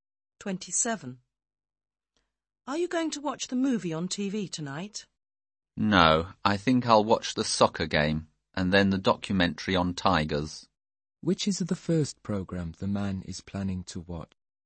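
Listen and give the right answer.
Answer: The soccer game.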